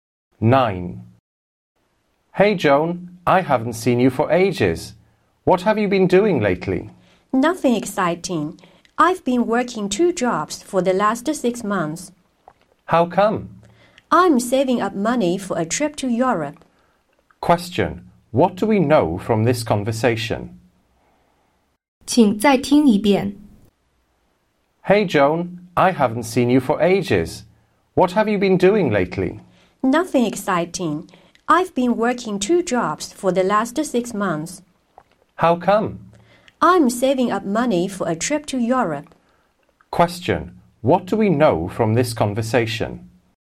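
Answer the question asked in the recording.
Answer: Joan has been working two jobs for six months to save money for a trip to Europe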